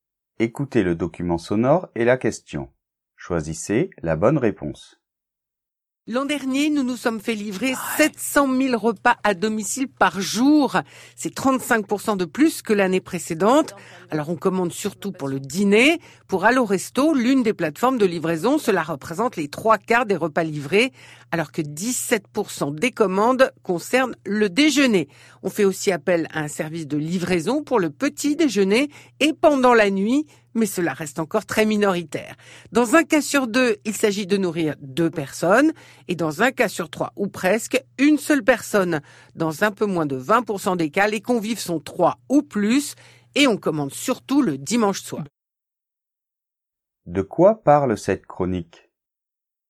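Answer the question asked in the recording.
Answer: De la livraison de repas à domicile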